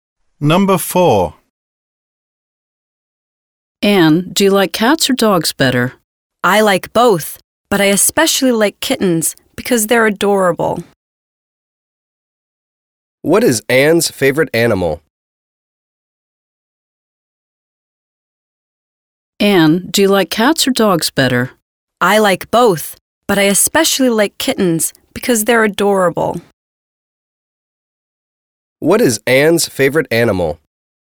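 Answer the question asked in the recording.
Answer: Kittens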